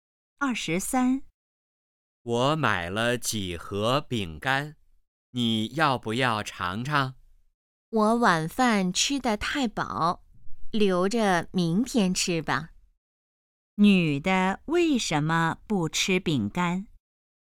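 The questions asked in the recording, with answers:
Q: 女的为什么不吃饼干?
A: 晚饭吃得太饱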